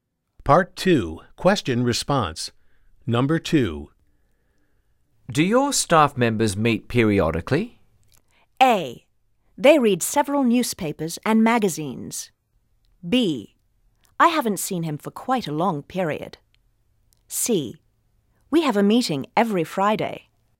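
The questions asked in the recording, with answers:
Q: Do your staff members meet periodically?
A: C: We have a meeting every Friday.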